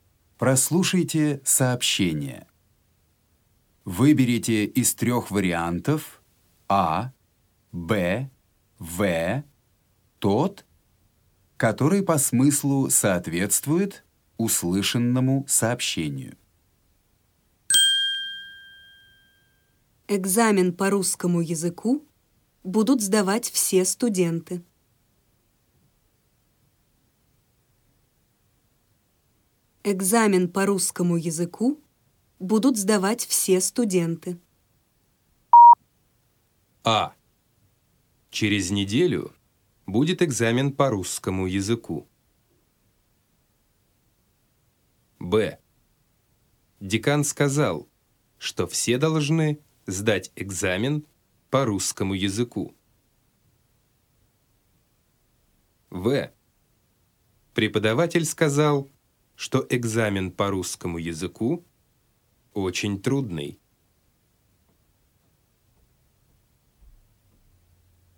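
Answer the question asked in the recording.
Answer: Б: Декан сказал, что все должны сдать экзамен по русскому языку.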